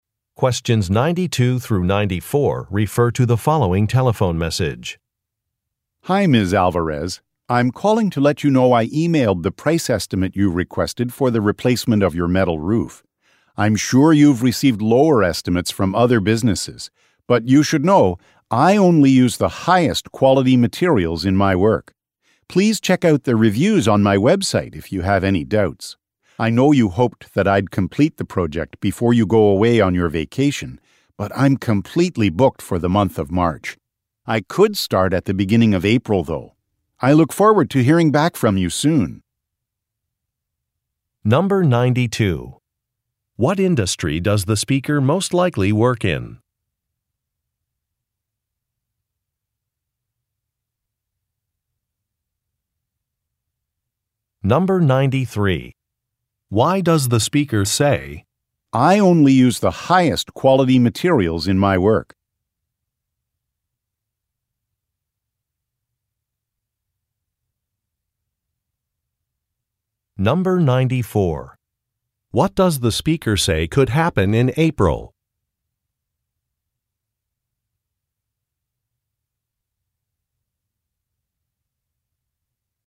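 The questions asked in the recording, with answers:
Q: What industry does the speaker most likely work in?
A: Roofing / construction

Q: Why does the speaker say, "I only use the highest quality materials in my work"?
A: To explain why his estimate is higher than others

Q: What does the speaker say could happen in April?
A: He could start the roof project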